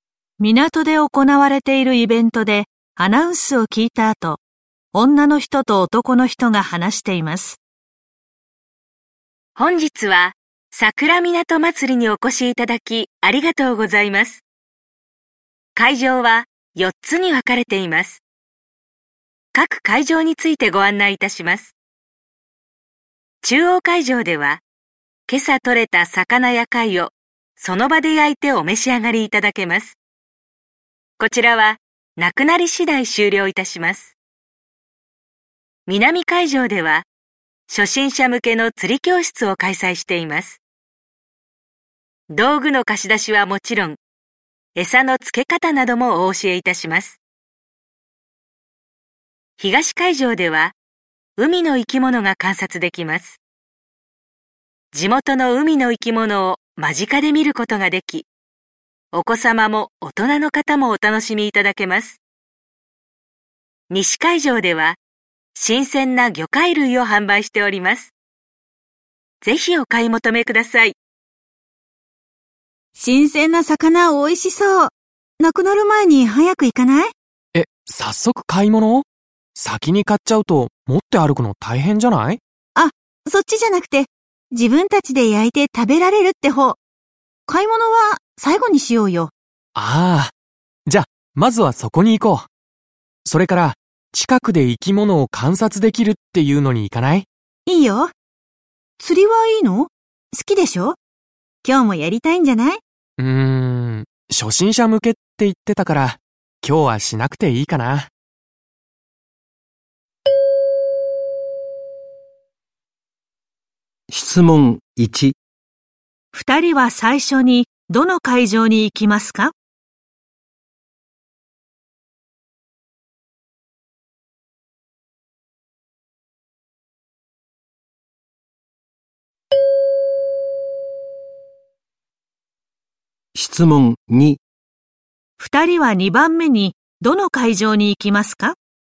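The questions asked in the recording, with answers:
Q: 二人は最初にどの会場に行きますか?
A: 中央会場

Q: 二人は2番目にどの会場に行きますか?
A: 東会場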